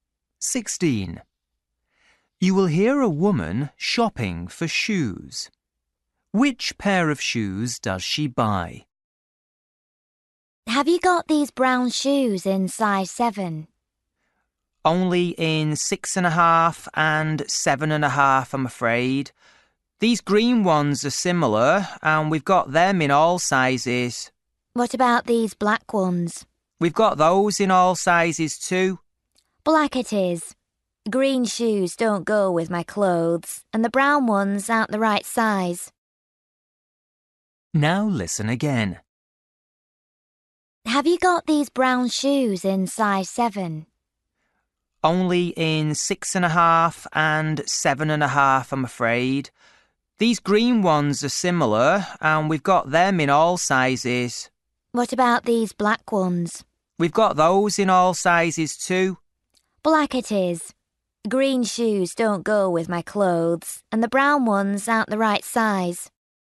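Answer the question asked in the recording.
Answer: the black ones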